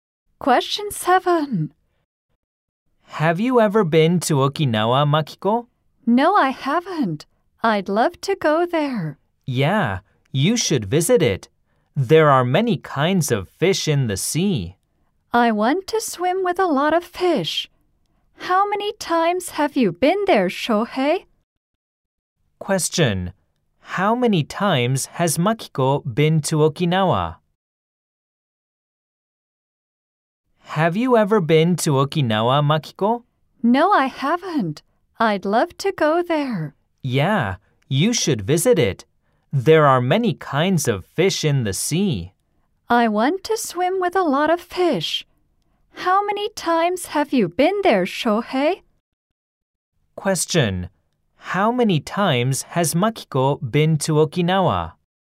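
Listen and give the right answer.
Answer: Never (zero times).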